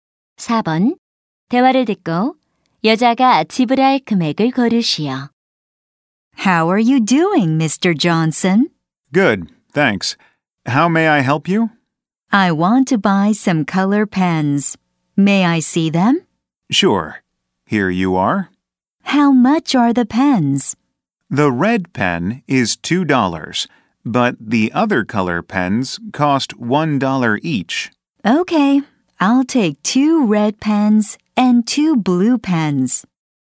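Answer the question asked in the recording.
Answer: 6달러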